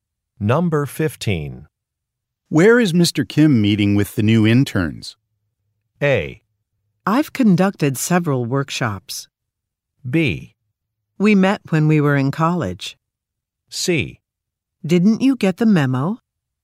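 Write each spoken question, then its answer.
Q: Where is Mr. Kim meeting with the new interns?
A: C: Didn't you get the memo?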